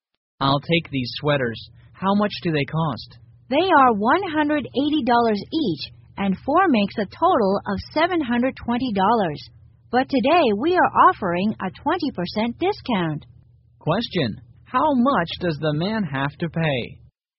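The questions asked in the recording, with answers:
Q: Question, how much does the man have to pay?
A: $576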